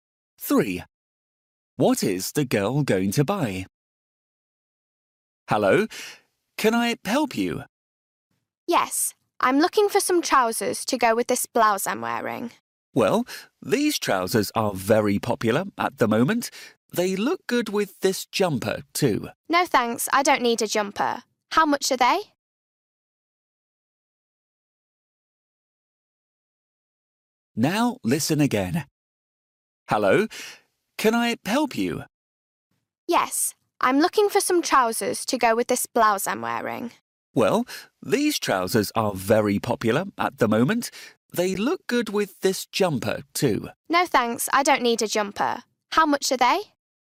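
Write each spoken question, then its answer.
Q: What is the girl going to buy?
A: trousers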